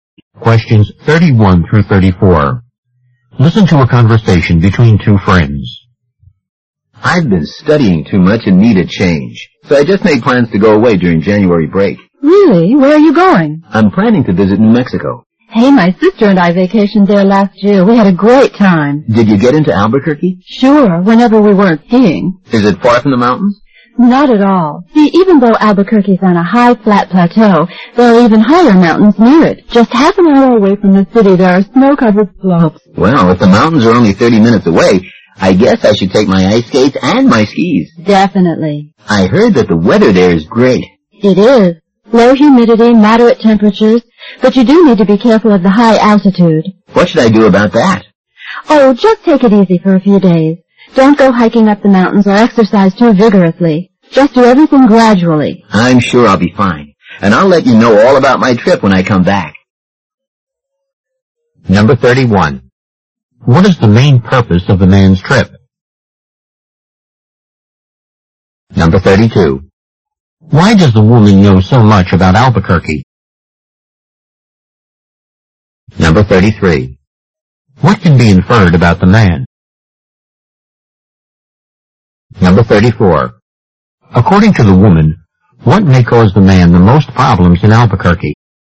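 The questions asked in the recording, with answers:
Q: Why does the woman know so much about Albuquerque?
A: She vacationed there with her sister last year

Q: According to the woman, what may cause the man the most problems in Albuquerque?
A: The high altitude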